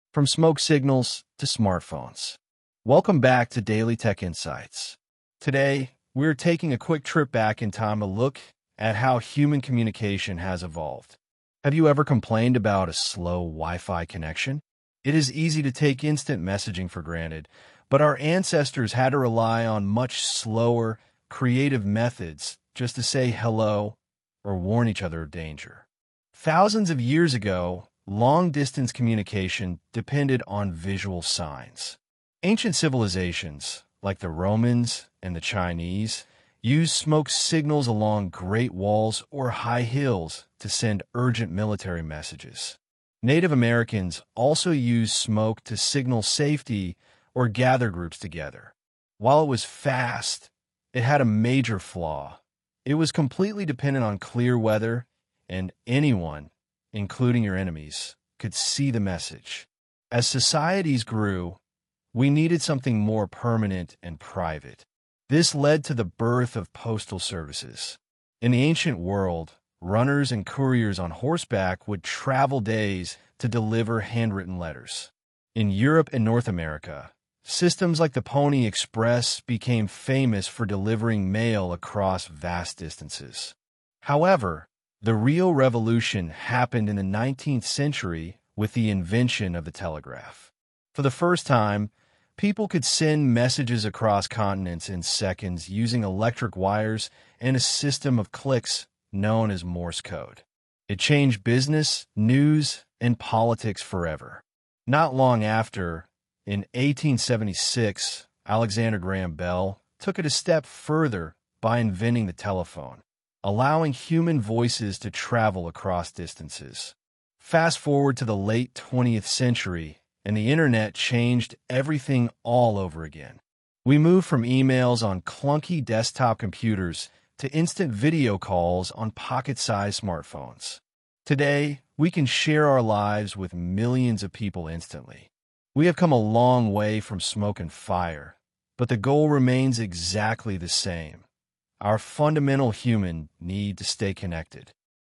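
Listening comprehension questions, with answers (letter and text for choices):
II. Choose the correct answer:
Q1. What is the main purpose of this podcast episode?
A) To complain about slow modern internet speeds.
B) To explain how military strategy has changed over time.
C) To explore the historical progress of human communication.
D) To compare the inventions of Alexander Graham Bell.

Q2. Which group of people used smoke signals along great walls for military purposes?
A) The Romans and the Chinese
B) Native Americans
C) European couriers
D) 19th-century inventors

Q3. According to the speaker, what was a major disadvantage of using smoke signals?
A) They took too long to create.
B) They only worked during the night.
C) They required expensive materials.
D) They relied entirely on good weather conditions.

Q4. Why did societies shift from smoke signals to postal services?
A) They wanted messages that were faster and louder.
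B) They needed a more permanent and private way to communicate.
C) Horseback riding became a popular hobby.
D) Wood for fires became too expensive.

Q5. What historical mail delivery system was explicitly mentioned in the text?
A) The Roman Runners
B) The Pony Express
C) The Continental Post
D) The Electric Wire Service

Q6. In which century was the telegraph invented?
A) The 18th century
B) The 19th century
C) The 20th century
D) The 21st century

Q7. How did the telegraph send messages across long distances?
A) By using trained pigeons.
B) By transmitting human voices over wires.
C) By using electric wires and Morse code clicks.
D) By printing newspapers automatically.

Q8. What major milestone happened in the year 1876?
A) The Internet was created.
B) The telephone was invented.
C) The Pony Express stopped working.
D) The first email was sent.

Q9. What shift in internet usage did the speaker mention happening in the late 20th century?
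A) Moving from emails on desktops to video calls on smartphones.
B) Moving from smoke signals straight to mobile phones.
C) A decline in the number of people using technology.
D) The complete disappearance of handwritten letters.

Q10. According to the conclusion of the podcast, what has remained unchanged throughout history?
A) The technology we use to write letters.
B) The human need to connect with one another.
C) The cost of long-distance communication.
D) The reliance on weather for sending messages.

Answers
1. C) To explore the historical progress of human communication.
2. A) The Romans and the Chinese
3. D) They relied entirely on good weather conditions.
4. B) They needed a more permanent and private way to communicate.
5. B) The Pony Express
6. B) The 19th century
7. C) By using electric wires and Morse code clicks.
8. B) The telephone was invented.
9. A) Moving from emails on desktops to video calls on smartphones.
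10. B) The human need to connect with one another.

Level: High Intermediate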